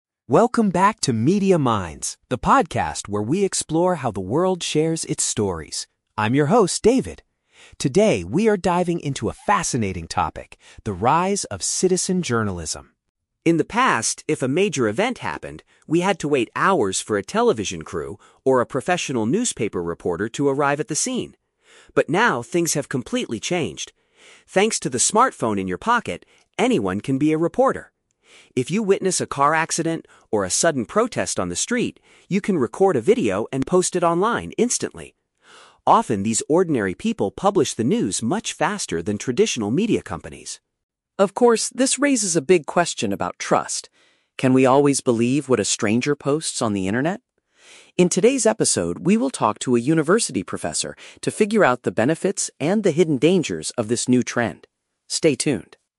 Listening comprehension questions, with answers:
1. What is the main subject of today's podcast episode?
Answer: How mobile devices allow everyday people to report the news.

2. According to the host, what is the main advantage of citizen journalism?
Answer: Information can be shared with the public almost immediately.

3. What will happen next in the podcast?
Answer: The host will interview an academic expert about the topic.

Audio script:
Podcast Host: Welcome back to Media Minds, the podcast where we explore how the world shares its stories. I'm your host, David. Today, we are diving into a fascinating topic: the rise of "citizen journalism."
In the past, if a major event happened, we had to wait hours for a television crew or a professional newspaper reporter to arrive at the scene. But now, things have completely changed. Thanks to the smartphone in your pocket, anyone can be a reporter. If you witness a car accident or a sudden protest on the street, you can record a video and post it online instantly. Often, these ordinary people publish the news much faster than traditional media companies.
Of course, this raises a big question about trust. Can we always believe what a stranger posts on the internet? In today's episode, we will talk to a university professor to figure out the benefits and the hidden dangers of this new trend. Stay tuned!